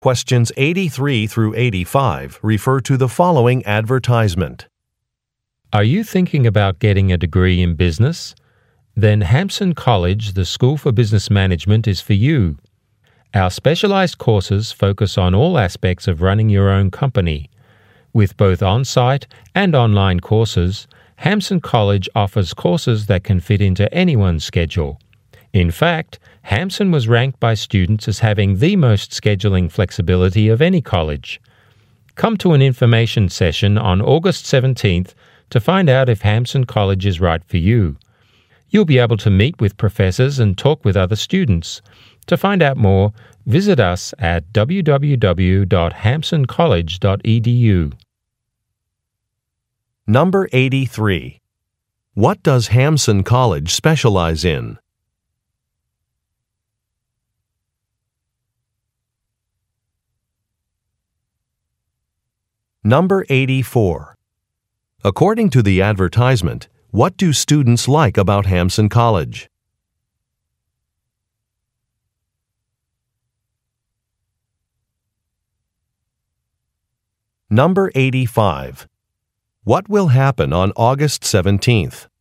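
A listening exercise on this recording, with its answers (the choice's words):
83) What does Hamson College specialize in?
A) Teacher training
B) Industrial design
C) Computer programming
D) Business management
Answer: Business management

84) According to the advertisement, what do students like about Hamson College?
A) The quality of the instruction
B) The flexible scheduling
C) The low tuition costs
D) The work experience opportunities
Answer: The flexible scheduling

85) What will happen on August 17?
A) A reading group will meet.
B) Students will graduate.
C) An information session will be held.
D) The registration period will end.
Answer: An information session will be held.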